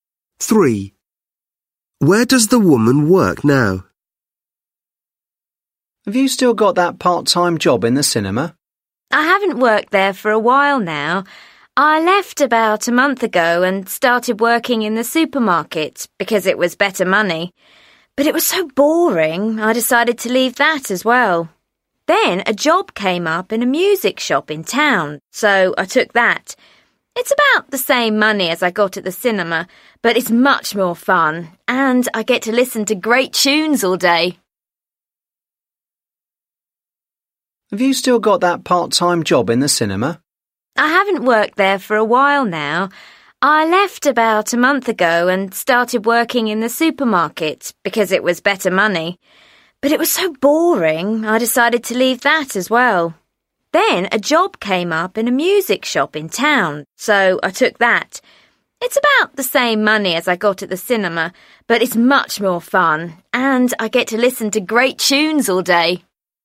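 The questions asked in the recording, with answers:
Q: Where does the woman work now?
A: in a music shop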